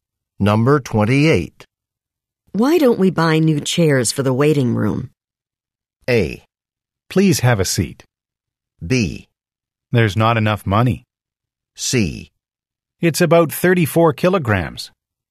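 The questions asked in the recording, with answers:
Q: Why don't we buy new chairs for the waiting room?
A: B: There's not enough money.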